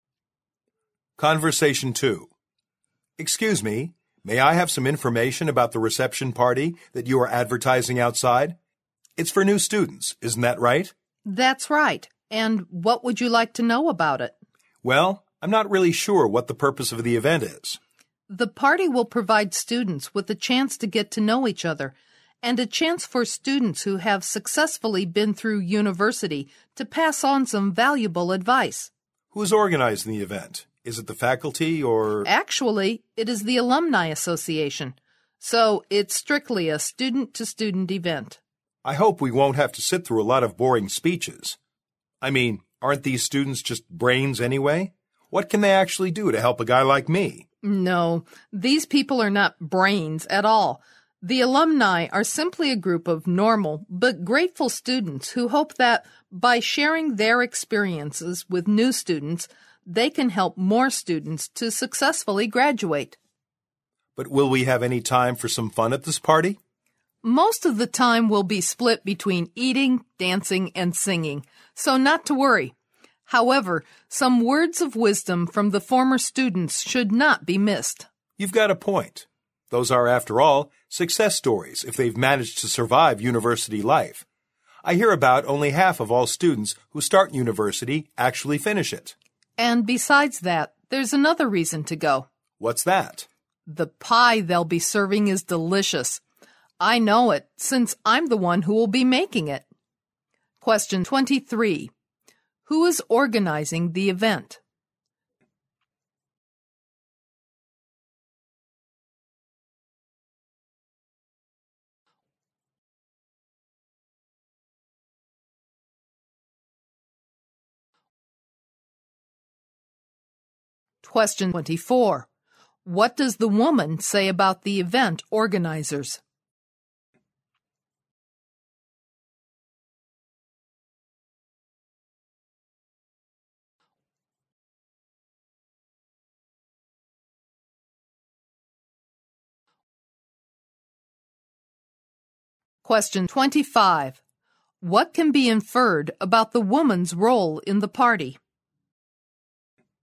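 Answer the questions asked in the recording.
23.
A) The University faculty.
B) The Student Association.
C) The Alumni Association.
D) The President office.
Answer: C) The Alumni Association.
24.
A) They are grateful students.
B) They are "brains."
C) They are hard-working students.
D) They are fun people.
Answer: A) They are grateful students.
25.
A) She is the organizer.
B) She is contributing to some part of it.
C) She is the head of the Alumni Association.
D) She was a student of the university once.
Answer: B) She is contributing to some part of it.

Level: 六级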